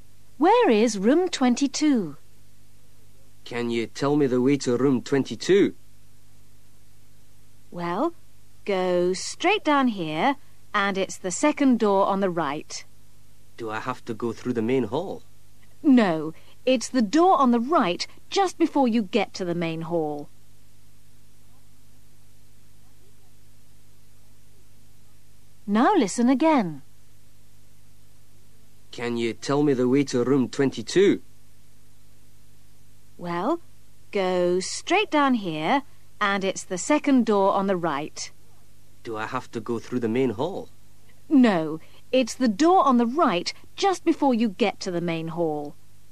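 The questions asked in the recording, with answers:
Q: Where is room 22?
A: The second door on the right, just before the main hall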